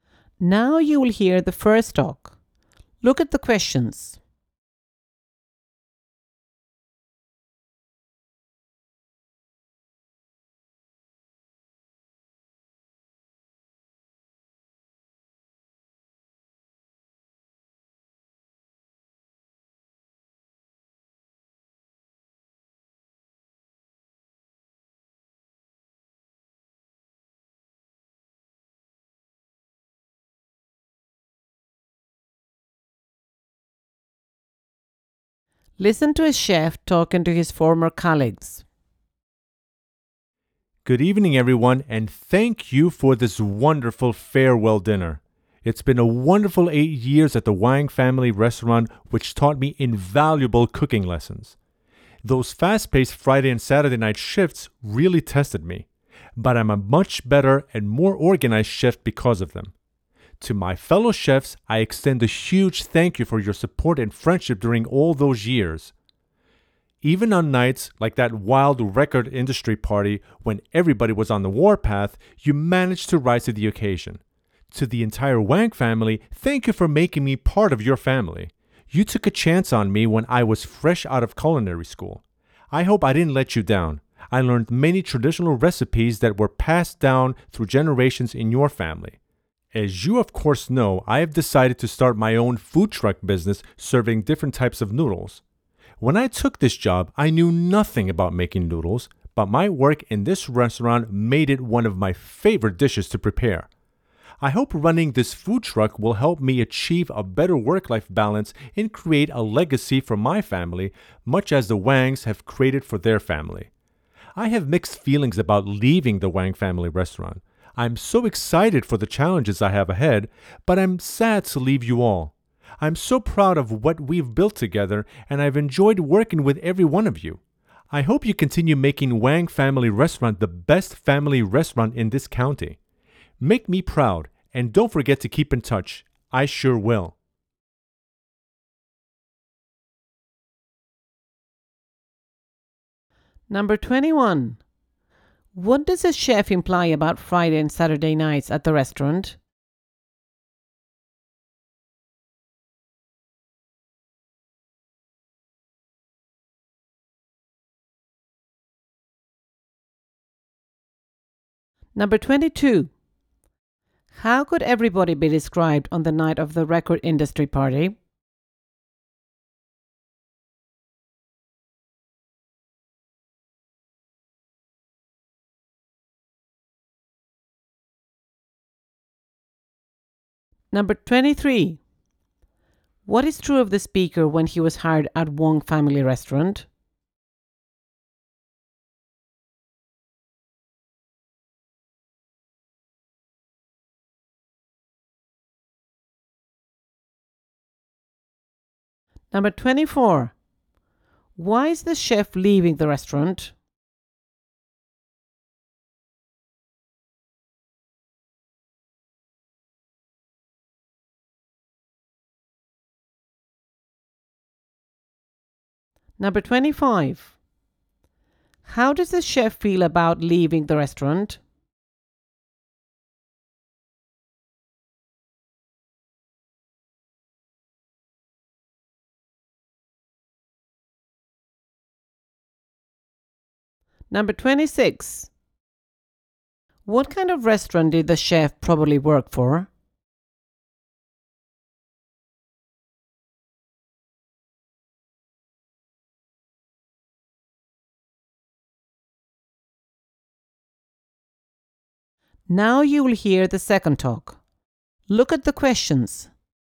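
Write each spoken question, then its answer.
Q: How could everybody be described on the night of the record industry party?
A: Angry (on the warpath)

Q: What is true of the speaker when he was hired at Wong Family Restaurant?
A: He was fresh out of culinary school and knew nothing about making noodles

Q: Why is the chef leaving the restaurant?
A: To start his own noodle food truck business

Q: How does the chef feel about leaving the restaurant?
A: Mixed feelings: excited but sad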